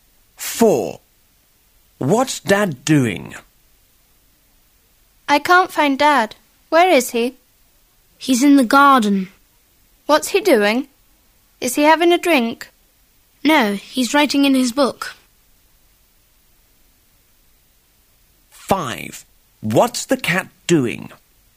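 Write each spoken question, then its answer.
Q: What's Dad doing?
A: Writing in his book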